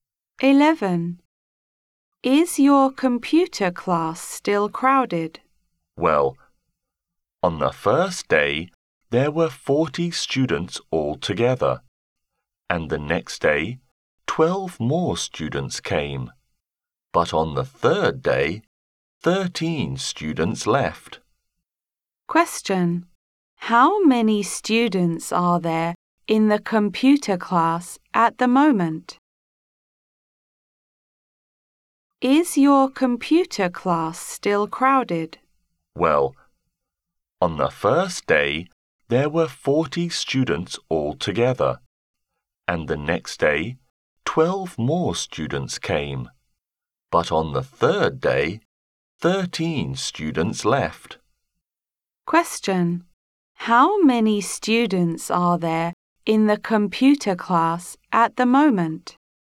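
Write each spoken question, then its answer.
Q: How many students are there in the computer class at the moment?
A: 39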